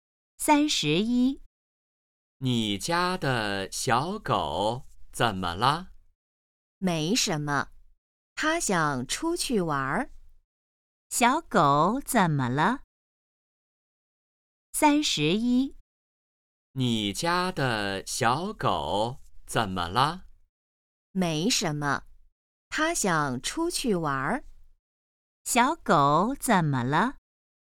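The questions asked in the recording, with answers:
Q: 小狗怎么了?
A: 它想出去玩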